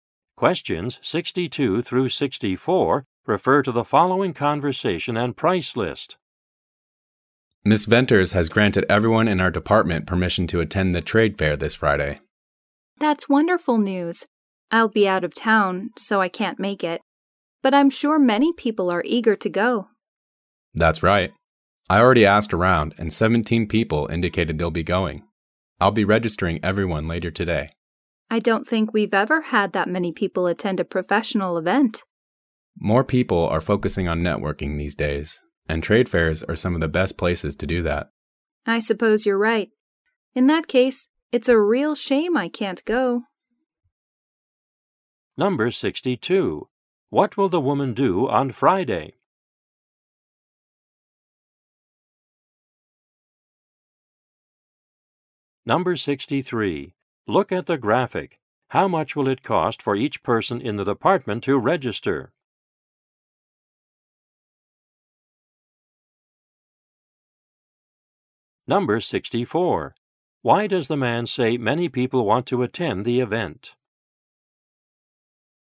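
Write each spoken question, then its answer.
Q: What will the woman do on Friday?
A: Be out of town

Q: Why does the man say many people want to attend the event?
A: More people are focusing on networking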